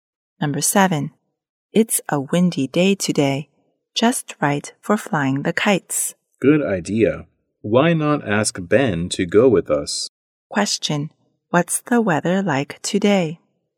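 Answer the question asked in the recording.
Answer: Windy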